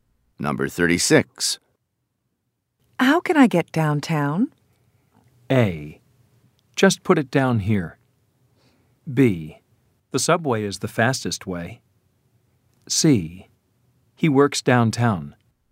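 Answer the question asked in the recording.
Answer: B: The subway is the fastest way.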